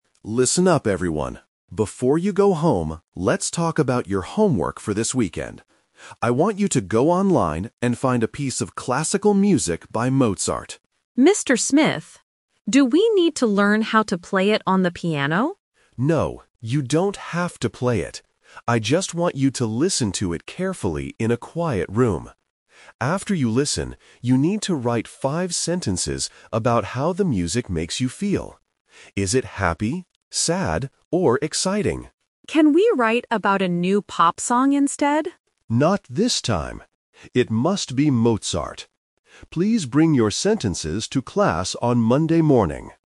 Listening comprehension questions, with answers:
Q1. What does the teacher want the students to do with the music?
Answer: Listen to it and write about their feelings.

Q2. What kind of music must the students choose for their homework?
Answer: Classical music by Mozart.

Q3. How long should their writing be?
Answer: Five sentences.

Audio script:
Teacher: Listen up, everyone. Before you go home, let's talk about your homework for this weekend. I want you to go online and find a piece of classical music by Mozart.
Student: Mr. Smith, do we need to learn how to play it on the piano?
Teacher: No, you don't have to play it. I just want you to listen to it carefully in a quiet room. After you listen, you need to write five sentences about how the music makes you feel. Is it happy, sad, or exciting?
Student: Can we write about a new pop song instead?
Teacher: Not this time. It must be Mozart. Please bring your sentences to class on Monday morning.